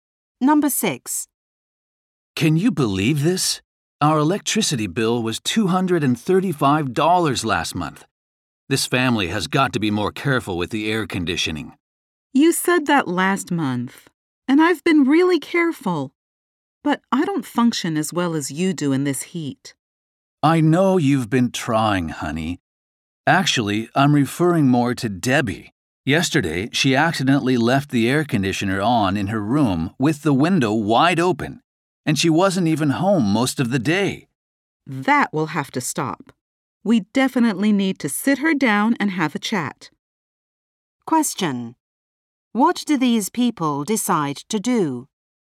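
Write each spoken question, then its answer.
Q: What do these people decide to do?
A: Have a talk with Debbie about using the air conditioner.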